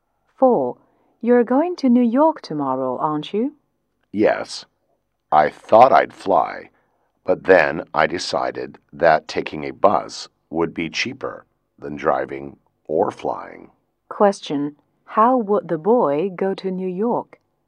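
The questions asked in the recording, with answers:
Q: How would the boy go to New York?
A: By bus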